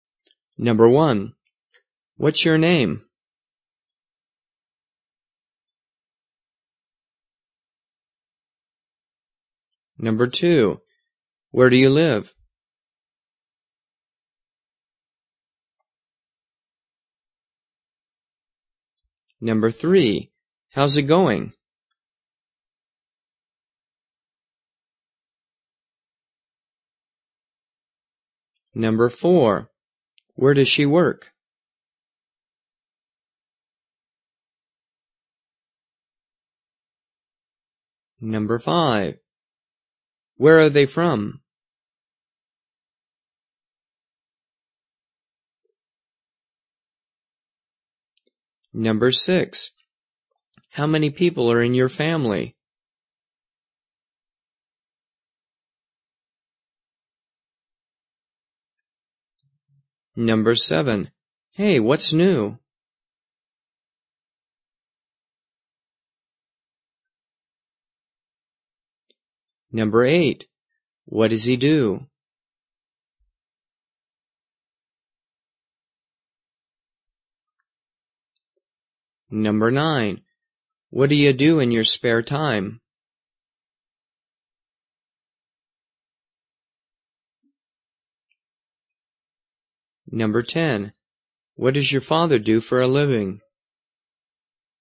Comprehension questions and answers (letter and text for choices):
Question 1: What's your _____________?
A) I'm Nancy.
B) I'm from Russia.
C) I'm a student.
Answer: A) I'm Nancy.

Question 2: Where do you _______________?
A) I'm from Canada.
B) I live in Chicago.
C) I'm fine.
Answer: B) I live in Chicago.

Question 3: How's _________________________?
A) Okay.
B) I'm going to school.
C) No problem.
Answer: A) Okay.

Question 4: _______________ does she _____________?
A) She likes to work.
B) She's a teacher.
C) She works at City Bank.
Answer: C) She works at City Bank.

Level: 初级